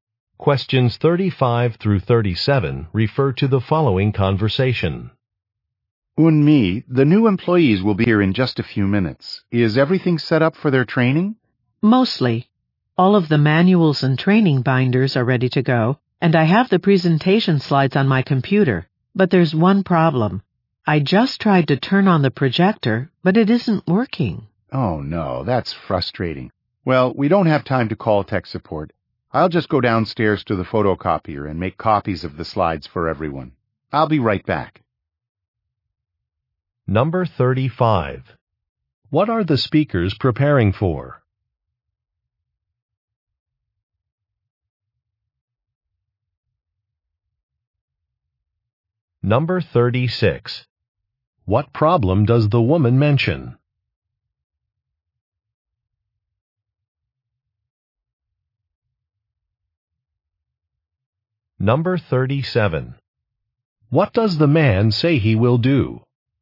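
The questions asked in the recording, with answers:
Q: What are the speakers preparing for?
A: A training session for new employees

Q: What problem does the woman mention?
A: The projector is not working

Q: What does the man say he will do?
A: Make copies of the slides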